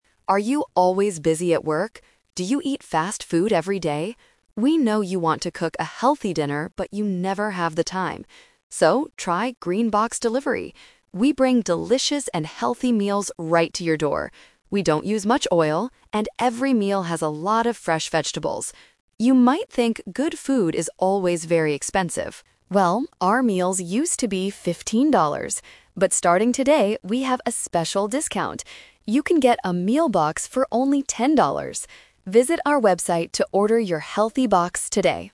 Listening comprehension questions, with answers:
Listen to the advertisement for a food delivery service. Choose the correct answer (A, B, or C) for each question.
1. What is the main problem of the people listening to this ad?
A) They are too busy to cook.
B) They do not like eating vegetables.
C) They cannot find a good supermarket.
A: They are too busy to cook.

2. What is special about the food from 'Green Box Delivery'?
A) It is fast food.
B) It has a lot of fresh vegetables.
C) It has a lot of oil and meat.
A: It has a lot of fresh vegetables.

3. How much does a meal box cost right now?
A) $10.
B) $15.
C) $50.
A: $10.

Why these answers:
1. The announcer says, "We know you want to cook a healthy dinner, but you never have the time." Option (B) is a trap; the ad mentions vegetables, but that is what the company offers, not what the people hate. Option (C) is a plausible problem for finding food, but it is not mentioned in the audio.
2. The ad clearly states that "every meal has a lot of fresh vegetables." Option (A) is a trap; fast food is what the listeners eat before trying Green Box, not what the company makes. Option (C) is incorrect because the ad says they "don't use much oil".
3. The announcer says they have a special discount, so "You can get a meal box for only ten dollars!" Option (B) is a trap; $15 is what the meals used to cost before the discount. Option (C) is not mentioned in the audio.

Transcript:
Announcer: Are you always busy at work? Do you eat fast food every day? We know you want to cook a healthy dinner, but you never have the time. So, try 'Green Box Delivery'! We bring delicious and healthy meals right to your door. We don't use much oil, and every meal has a lot of fresh vegetables. You might think good food is always very expensive. Well, our meals used to be fifteen dollars. But starting today, we have a special discount. You can get a meal box for only ten dollars! Visit our website to order your healthy box today.

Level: A2

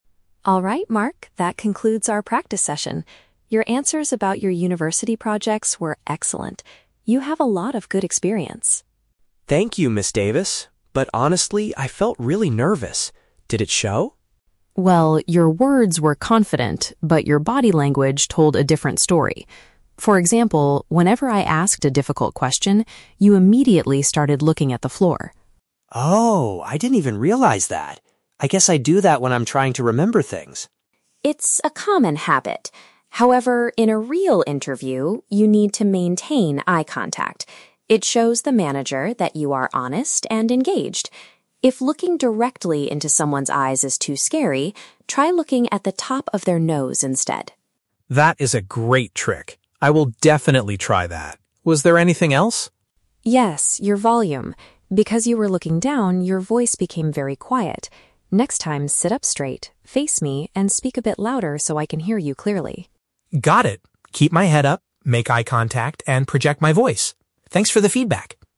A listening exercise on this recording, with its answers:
Listen to a conversation between a career counselor and a university student. Choose the best answer (A, B, or C) for each question.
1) What was positive about Mark's interview performance?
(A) His neat and professional clothing.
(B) His responses regarding his school work.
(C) His completely calm and relaxed attitude.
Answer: His responses regarding his school work.

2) What mistake did Mark make when faced with a tough question?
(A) He stared down at the ground.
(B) He asked the manager to repeat the information.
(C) He touched his nose several times.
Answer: He stared down at the ground.

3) What does Ms. Davis advise Mark to do to improve his speaking volume?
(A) Drink a glass of water before talking.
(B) Speak very slowly and take deep breaths.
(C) Adjust his sitting posture and look forward.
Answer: Adjust his sitting posture and look forward.

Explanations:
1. Ms. Davis praises Mark by saying, "Your answers about your university projects were excellent." Paraphrasing: answers = responses; university projects = school work.
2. Ms. Davis points out that whenever she asked a difficult question, Mark started "looking at the floor." Paraphrasing: looking at the floor = stared down at the ground; difficult question = tough question.
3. To fix his quiet voice, Ms. Davis tells him to "sit up straight, face me" next time. Paraphrasing: sit up straight = adjust his sitting posture; face me = look forward.

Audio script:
Davis: Alright, Mark, that concludes our practice session. Your answers about your university projects were excellent. You have a lot of good experience.
Mark: Thank you, Ms. Davis. But honestly, I felt really nervous. Did it show?
Davis: Well, your words were confident, but your body language told a different story. For example, whenever I asked a difficult question, you immediately started looking at the floor.
Mark: Oh, I didn't even realize that. I guess I do that when I'm trying to remember things.
Davis: It's a common habit. However, in a real interview, you need to maintain eye contact. It shows the manager that you are honest and engaged. If looking directly into someone's eyes is too scary, try looking at the top of their nose instead.
Mark: That is a great trick. I will definitely try that. Was there anything else?
Davis: Yes, your volume. Because you were looking down, your voice became very quiet. Next time, sit up straight, face me, and speak a bit louder so I can hear you clearly.
Mark: Got it. Keep my head up, make eye contact, and project my voice. Thanks for the feedback!

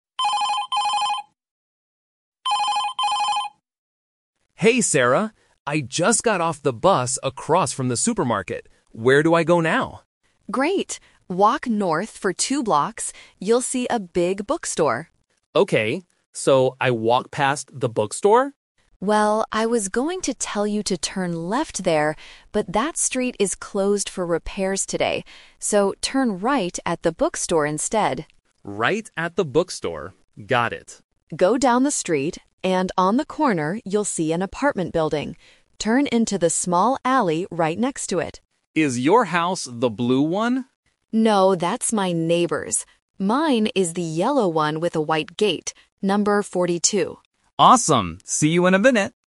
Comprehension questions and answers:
Listen to the telephone conversation between two friends. Choose the correct answer (A, B, or C) for each question.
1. Which way should Mark turn when he sees the bookstore?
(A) Turn left.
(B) Turn right.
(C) Walk past it.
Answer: Turn right.

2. Where is the small alley?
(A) Next to the supermarket.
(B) Behind the bookstore.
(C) Next to an apartment building.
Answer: Next to an apartment building.

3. What does Sarah's house look like?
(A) It is a blue house.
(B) It is a yellow house with a white gate.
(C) It is an apartment building on the corner.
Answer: It is a yellow house with a white gate.

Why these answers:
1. Sarah explicitly says, "turn right at the bookstore instead." The Trap: Option (A) is a trap. Sarah mentions "turn left," but immediately uses the "twist" technique by saying the street is closed. Option (C) is what Mark initially guessed, but Sarah corrected him.
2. Sarah gives the instruction to find the apartment building and then "Turn into the small alley right next to it." The Trap: Option (A) is where Mark starts his walk (the bus stop across from the supermarket). Option (B) is a plausible location but incorrect according to the audio.
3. Sarah describes her own house clearly: "Mine is the yellow one with a white gate." The Trap: Option (A) is a distractor because the blue house is mentioned, but it belongs to her neighbor. Option (C) is just a landmark on the way to the alley.

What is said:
Mark: Hey, Sarah. I just got off the bus across from the supermarket. Where do I go now?
Sarah: Great! Walk north for two blocks. You'll see a big bookstore.
Mark: Okay, so I walk past the bookstore?
Sarah: Well, I was going to tell you to turn left there, but that street is closed for repairs today. So, turn right at the bookstore instead.
Mark: Right at the bookstore. Got it.
Sarah: Go down the street, and on the corner you'll see an apartment building. Turn into the small alley right next to it.
Mark: Is your house the blue one?
Sarah: No, that's my neighbor's. Mine is the yellow one with a white gate. Number 42.

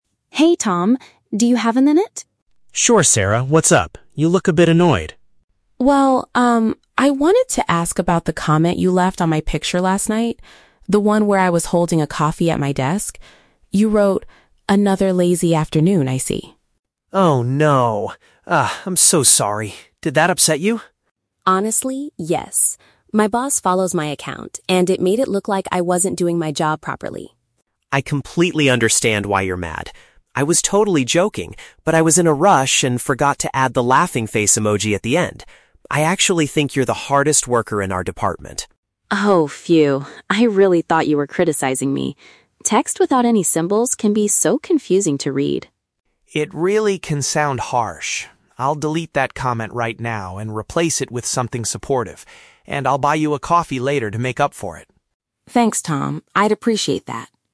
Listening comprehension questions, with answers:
Listen to a conversation between two colleagues. For each question, choose the correct answer (A, B, or C).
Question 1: Why was Sarah upset with Tom at the beginning?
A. He sent a rude email complaining to their manager.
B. He posted a remark that seemed disrespectful online.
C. He drank her cup of coffee without asking for permission.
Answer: He posted a remark that seemed disrespectful online.

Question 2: What was the root cause of the misunderstanding?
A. Tom failed to include a humorous digital symbol in his text.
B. Tom genuinely believed that Sarah was avoiding her daily tasks.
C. Sarah accidentally uploaded the wrong picture to her public profile.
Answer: Tom failed to include a humorous digital symbol in his text.

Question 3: How does Tom plan to resolve the situation?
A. He will speak to her boss directly to explain the funny joke.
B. He will remove his words and purchase a drink for her.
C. He will send her a long apology text with many smiley faces.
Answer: He will remove his words and purchase a drink for her.

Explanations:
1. Sarah was upset because of the "comment" Tom left on her picture (a remark online) that made her look like she wasn't doing her job (disrespectful). Option (A) is a trap; she mentions her "boss" follows her, but Tom didn't send an email to the manager. Option (C) is a trap; "coffee" is mentioned in the photo, but he didn't drink it.
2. Tom explains that he was joking but "forgot to add the laughing face emoji" (failed to include a humorous digital symbol). Option (B) is a trap; he wrote the word "lazy", but he explicitly says he thinks she is the "hardest worker," so he didn't genuinely believe she was lazy. Option (C) is not mentioned.
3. Tom promises to "delete that comment" (remove his words) and "buy you a coffee later" (purchase a drink). Option (A) is a trap; the boss was mentioned earlier, but Tom does not offer to talk to the boss. Option (C) is a trap; he mentions the missing emoji/symbol, but he doesn't promise to send a text with many of them.

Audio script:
Sarah: Hey Tom. Do you have a minute?
Tom: Sure, Sarah. What's up? You look a bit annoyed.
Sarah: Well, um, I wanted to ask about the comment you left on my picture last night. The one where I was holding a coffee at my desk. You wrote, "Another lazy afternoon, I see."
Tom: Oh no! Ah... I'm so sorry! Did that upset you?
Sarah: Honestly, yes. My boss follows my account, and it made it look like I wasn't doing my job properly.
Tom: I completely understand why you're mad. I was totally joking, but I was in a rush and forgot to add the laughing face emoji at the end. I actually think you're the hardest worker in our department.
Sarah: Oh, phew. I really thought you were criticizing me. Text without any symbols can be so confusing to read.
Tom: It really can sound harsh. I'll delete that comment right now and replace it with something supportive. And I'll buy you a coffee later to make up for it!

